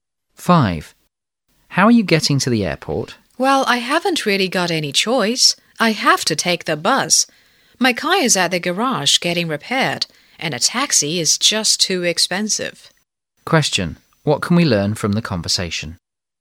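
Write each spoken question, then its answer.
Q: Question: What can we learn from the conversation?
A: The speaker will take the bus to the airport because the car is being repaired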